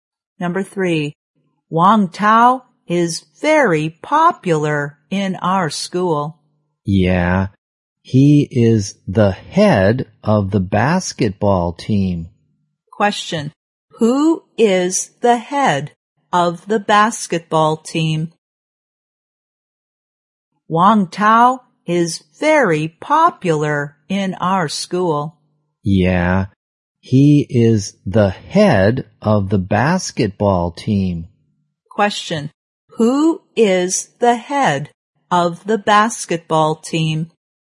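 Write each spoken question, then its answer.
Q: Who is the head of the basketball team?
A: Wang Tao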